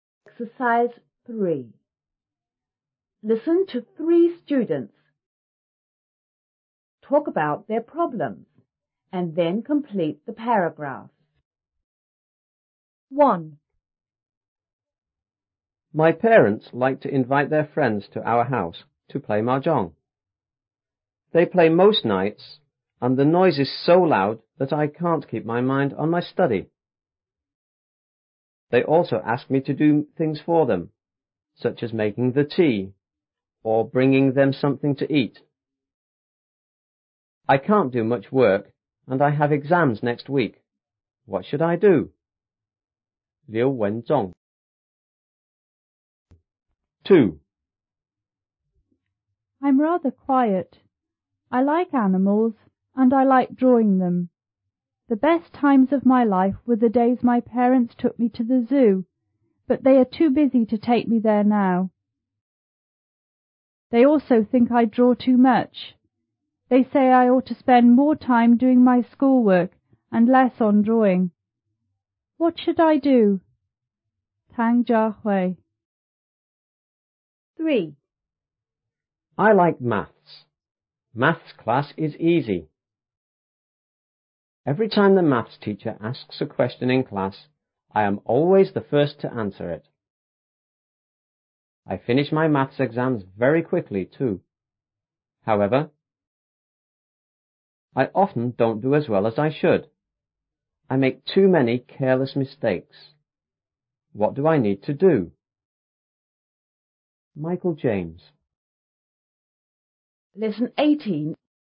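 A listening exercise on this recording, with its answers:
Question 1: His p_ play mah-jong with their friends m_ nights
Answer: parents; most

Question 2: and the n_____ makes it hard for him to keep his m____ on his study.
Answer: noise; mind

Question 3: He is worried about his e____.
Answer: exams

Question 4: She loves g___ to the zoo but her parents are too b___ to take her there now.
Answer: going; busy

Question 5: He can a____ his maths teacher's questions in c____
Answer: answer; class

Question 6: but he makes a lot of m____ in exams.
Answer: mistakes

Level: 初中英语广州版5B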